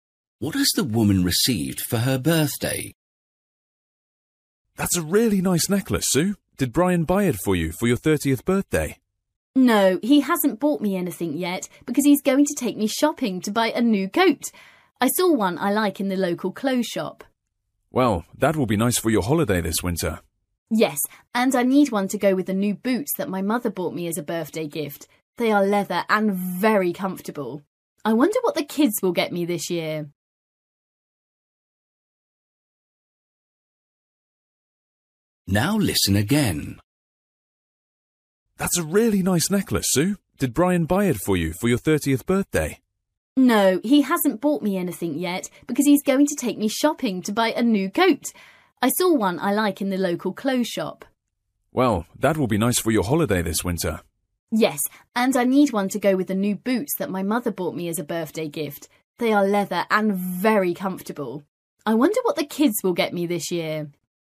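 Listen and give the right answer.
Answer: Boots (from her mother)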